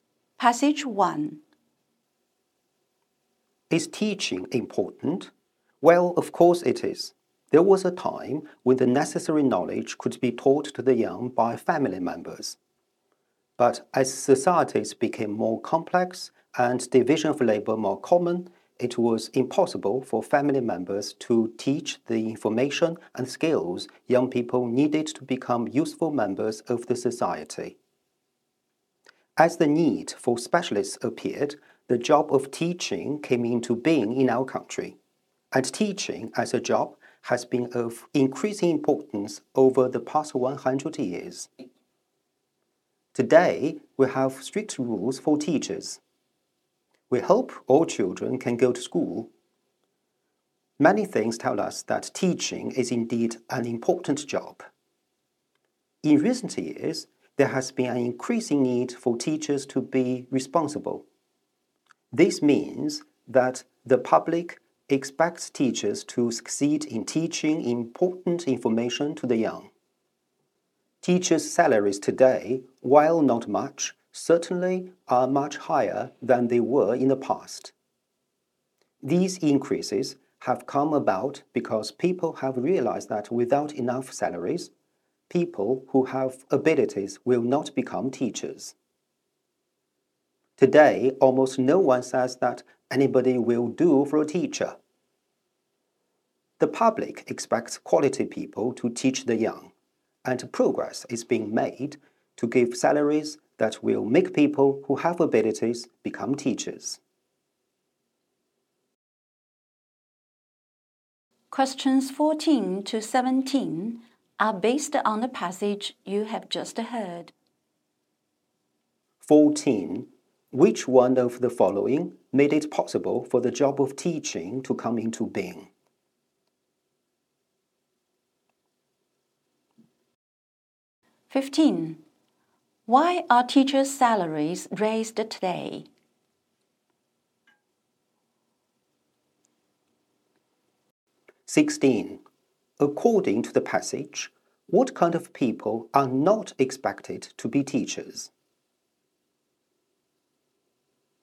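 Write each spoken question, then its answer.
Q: Why are teachers' salaries raised today?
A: Without enough salaries, able people will not become teachers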